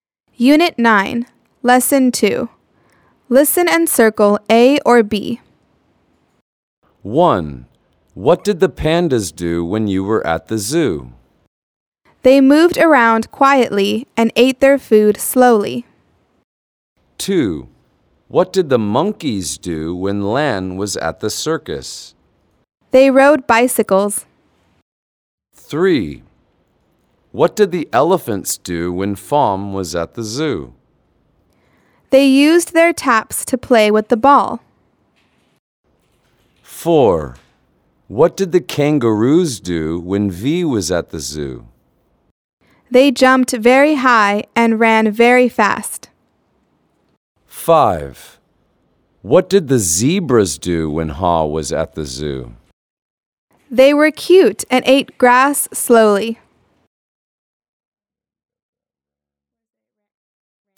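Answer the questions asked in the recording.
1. They moved around quietly and ate their food slowly.
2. They rode bicycles.
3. They used their trunks to play with the ball.
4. They jumped very high and ran very fast.
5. They were cute and ate grass slowly.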